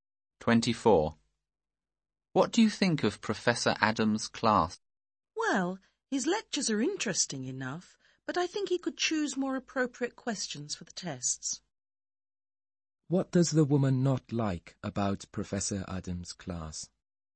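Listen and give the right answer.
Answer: The test questions are not appropriate.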